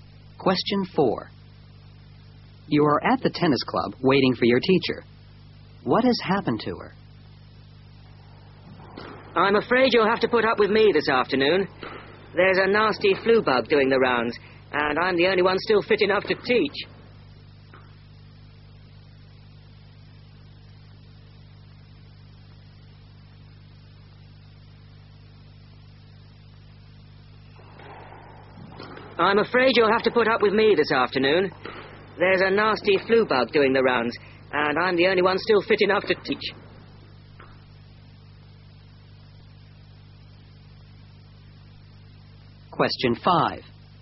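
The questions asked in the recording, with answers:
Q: What has happened to her?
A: She has the flu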